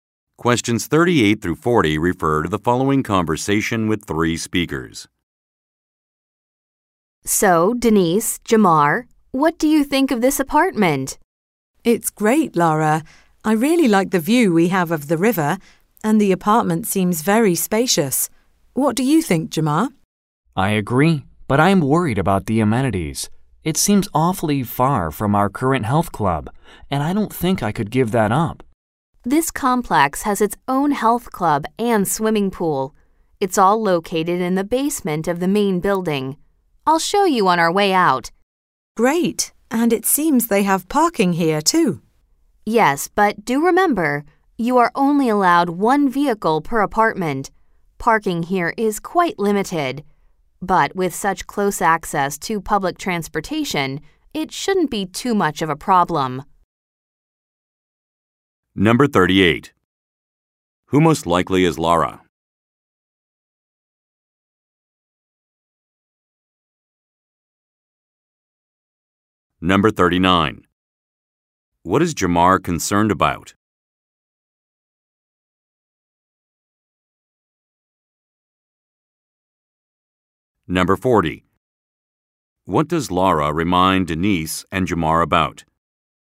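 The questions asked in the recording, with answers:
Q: What is Jamar concerned about?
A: The amenities; being far from their health club

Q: What does Lara remind Denise and Jamar about?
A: Only one vehicle is allowed per apartment (limited parking)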